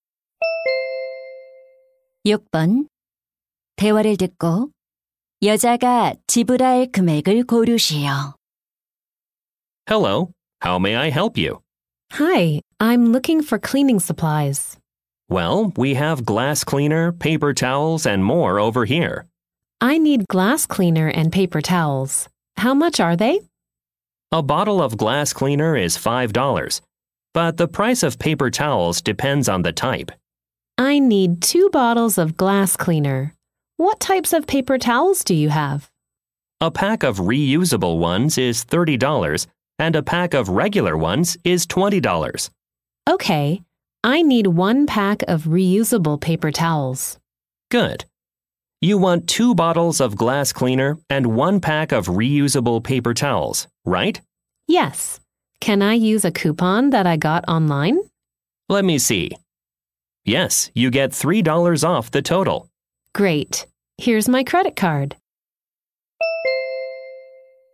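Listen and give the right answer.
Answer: $37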